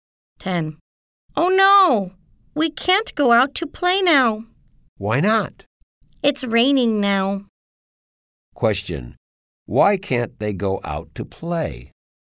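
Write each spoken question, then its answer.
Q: Question. Why can't they go out to play?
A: It's raining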